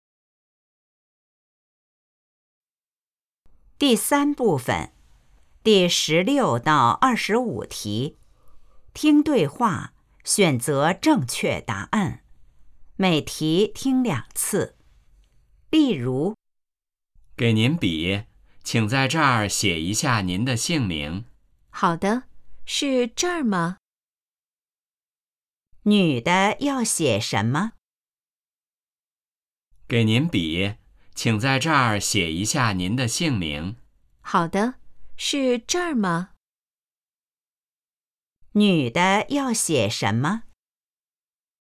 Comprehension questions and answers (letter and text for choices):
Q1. 女的要写什么?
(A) 姓名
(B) 时间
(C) 问题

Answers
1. (A) 姓名

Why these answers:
The hardest listening part: a short dialogue, then a spoken question, with three written answers. Pre-read the options, then listen for the key word.

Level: HSK 2